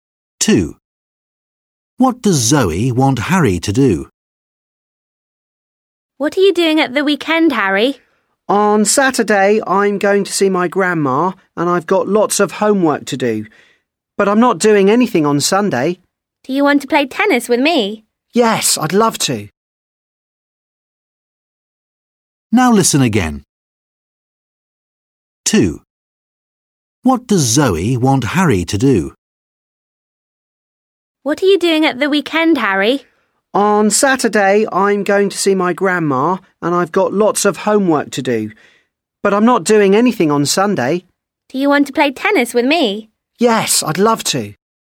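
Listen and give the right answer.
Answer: play tennis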